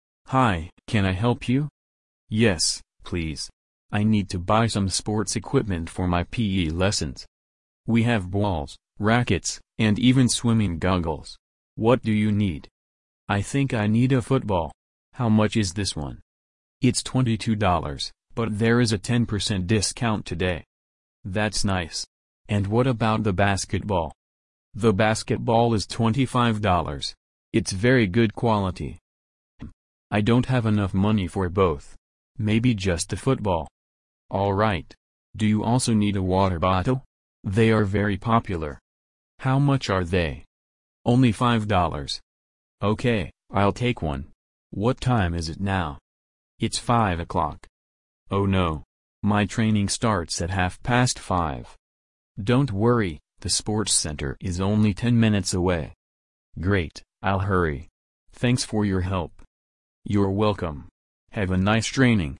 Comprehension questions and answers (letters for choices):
Прослушайте диалог и выберите правильный вариант ответа для каждого вопроса (A–E).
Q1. How much is the football with the discount?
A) $19.80.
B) $22.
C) $25.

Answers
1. A

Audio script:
– Hi, can I help you?
– Yes, please. I need to buy some sports equipment for my PE lessons.
– We have balls, rackets, and even swimming goggles. What do you need?
– I think I need a football. How much is this one?
– It's $22, but there is a 10 percent discount today.
– That's nice. And what about the basketball?
– The basketball is $25. It's very good quality.
– Hmm, I don't have enough money for both. Maybe just the football.
– All right. Do you also need a water bottle? They are very popular.
– How much are they?
– OK, I'll take one. What time is it now?
– It's five o'clock.
– Oh no! My training starts at half past five.
– Don't worry, the sports centre is only ten minutes away.
– Great, I'll hurry. Thanks for your help!
– You're welcome. Have a nice training!